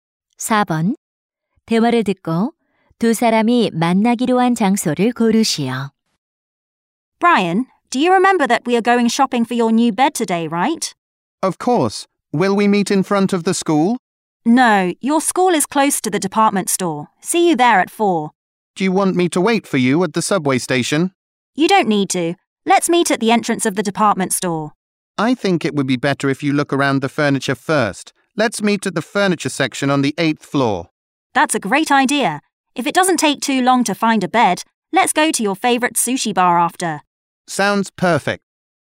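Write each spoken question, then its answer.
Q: 대화를 듣고 두 사람이 만나기로 한 장소를 고르시오.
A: 백화점 8층 가구 매장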